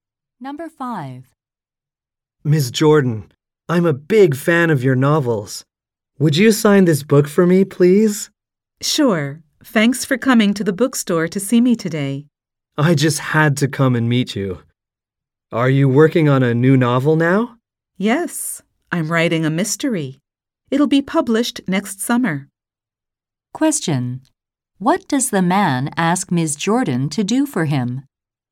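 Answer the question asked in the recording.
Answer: Sign his book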